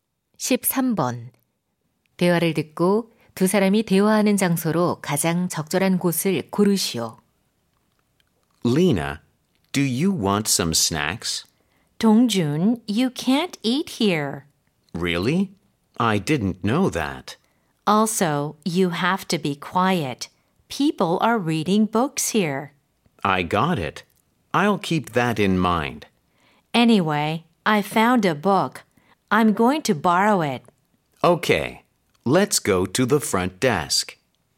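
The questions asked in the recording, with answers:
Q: 대화를 듣고 두 사람이 대화하는 장소로 가장 적절한 곳을 고르시오.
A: 도서관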